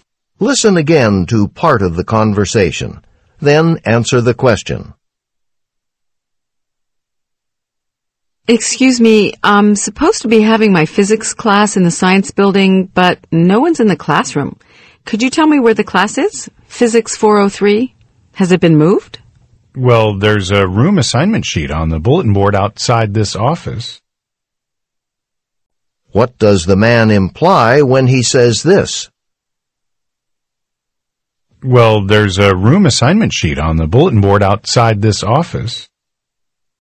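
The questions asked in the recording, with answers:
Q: What does the man imply when he says this?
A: The student can find the new room on the assignment sheet outside the office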